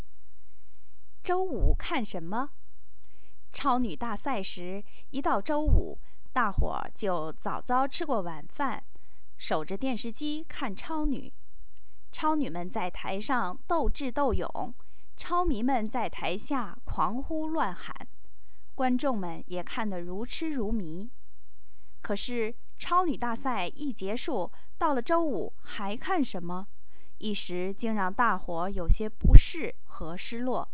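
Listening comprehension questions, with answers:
Please answer the following questions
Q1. 为什么"超女"比赛结束后,人们在周五晚上有些不适和失落?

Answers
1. 因为以前每到周五大家都守着电视看超女,比赛结束后周五不知道看什么了

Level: 3rd Year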